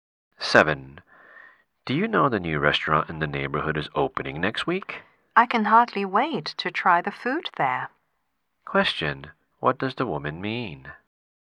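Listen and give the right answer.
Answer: She is eager to try the new restaurant's food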